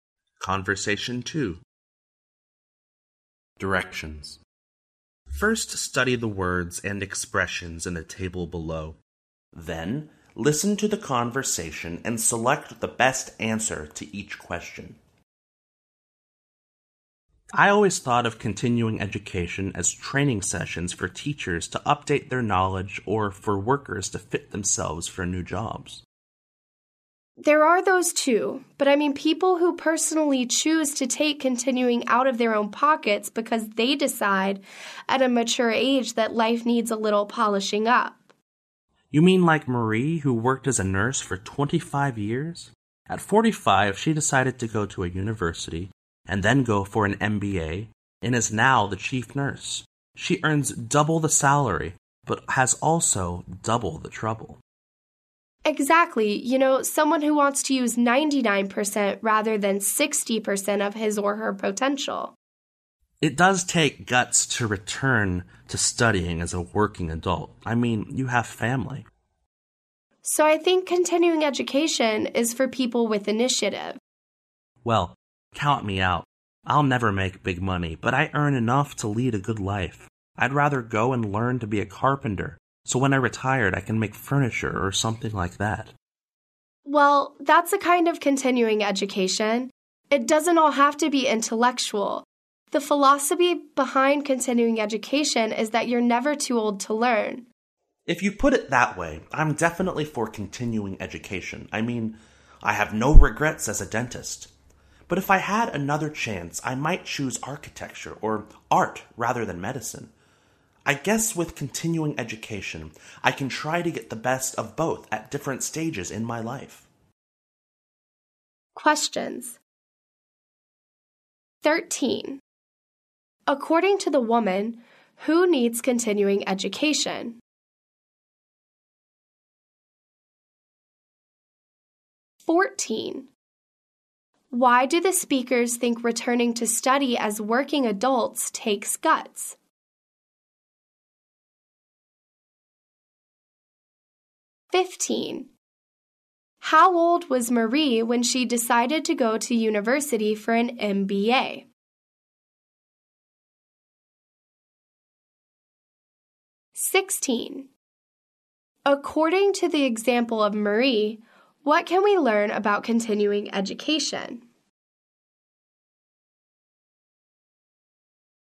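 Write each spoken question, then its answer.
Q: Why do the speakers think returning to study as working adults takes guts?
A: Because they have families

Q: How old was Marie when she decided to go to university for an MBA?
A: 45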